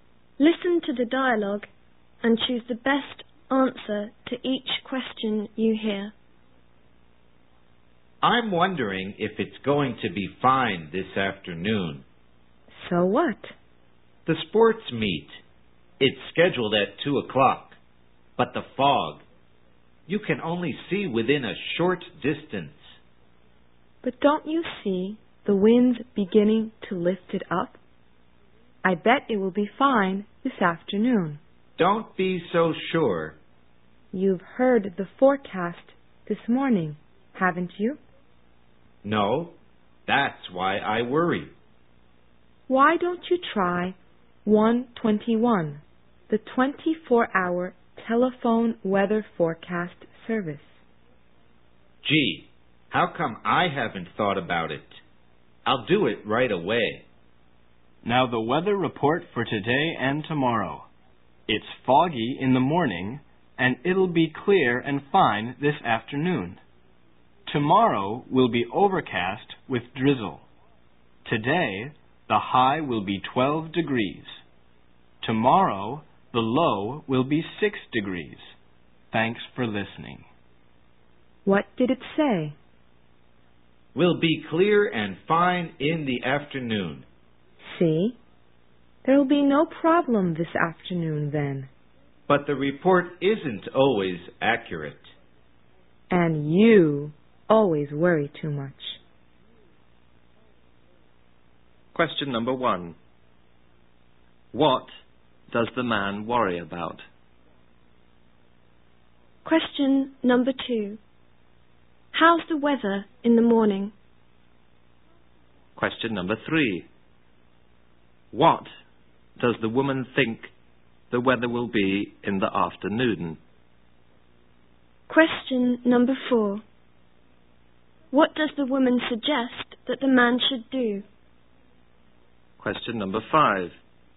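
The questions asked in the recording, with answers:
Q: What does the man worry about?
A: Whether it will be fine for the sports meet this afternoon

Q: How's the weather in the morning?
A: Foggy

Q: What does the woman think the weather will be in the afternoon?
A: Fine

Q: What does the woman suggest that the man should do?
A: Call 121, the telephone weather forecast service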